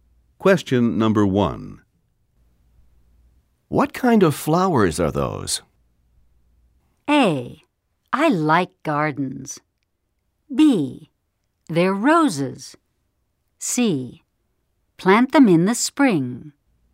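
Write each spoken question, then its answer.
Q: What kind of flowers are those?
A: B: They're roses.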